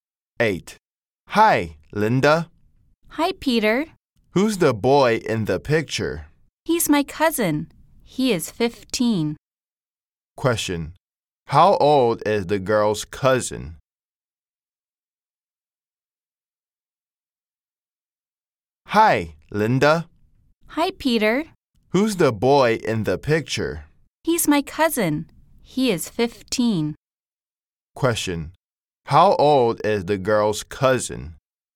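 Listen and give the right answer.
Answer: 15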